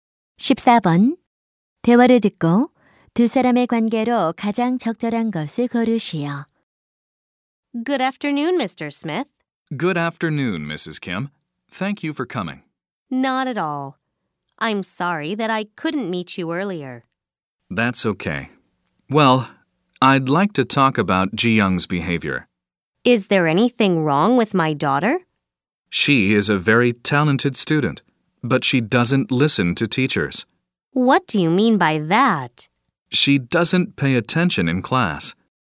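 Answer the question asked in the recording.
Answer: 교사와 학부모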